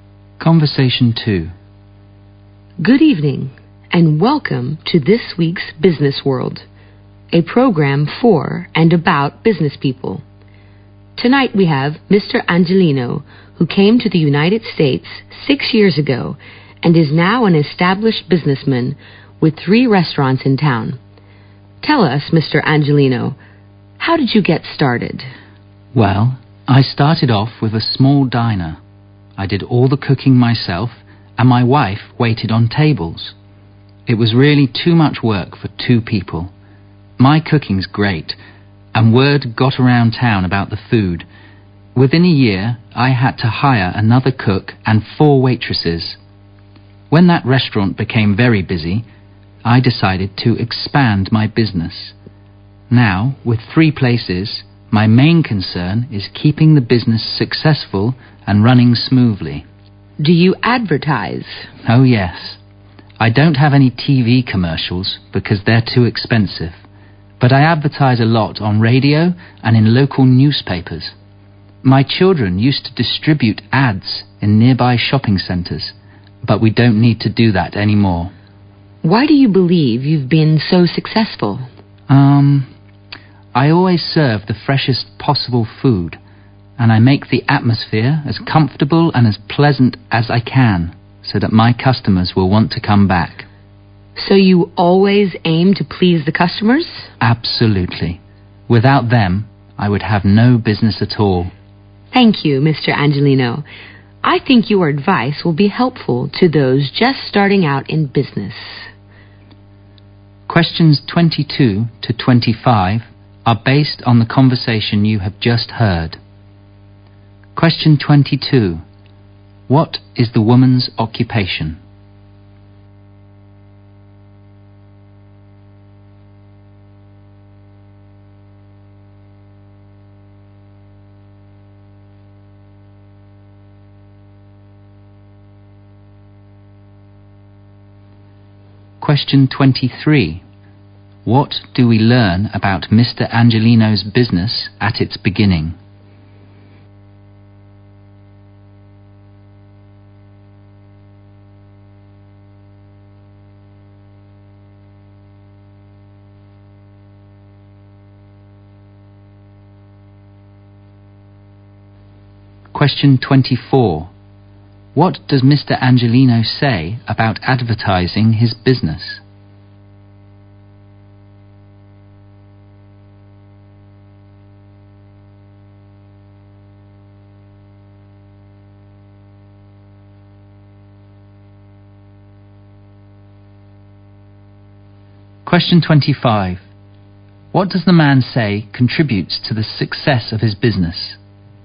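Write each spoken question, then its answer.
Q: What is the woman's occupation?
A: She hosts a radio/TV program.

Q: What do we learn about Mr. Angelino's business at its beginning?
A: It was a small diner run by him and his wife, which was too much work for two people.

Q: What does Mr. Angelino say about advertising his business?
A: He advertises on radio and in local newspapers, not on TV.

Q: What does the man say contributes to the success of his business?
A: Fresh food and a comfortable, pleasant atmosphere that pleases customers.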